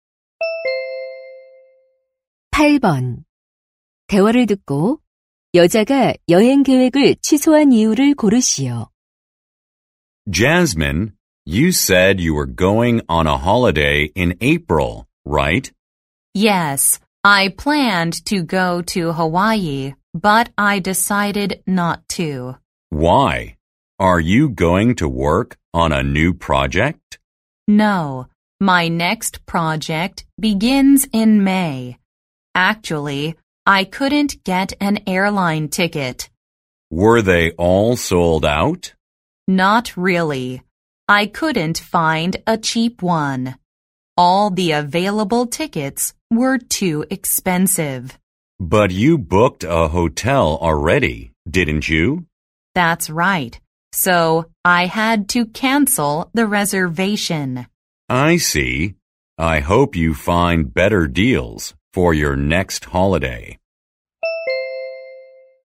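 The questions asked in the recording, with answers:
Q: 대화를 듣고 여자가 여행 계획을 취소한 이유를 고르시오.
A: 저렴한 항공권을 구하지 못해서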